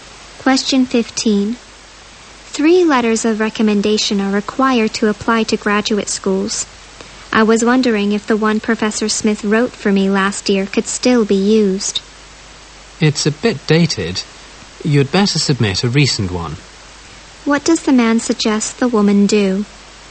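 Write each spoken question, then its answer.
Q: What does the man suggest the woman do?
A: Submit a recent letter of recommendation.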